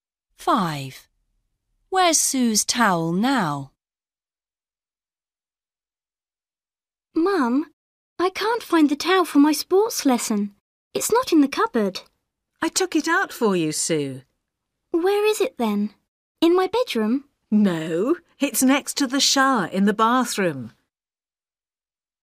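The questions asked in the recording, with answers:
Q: Where's Sue's towel now?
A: Next to the shower in the bathroom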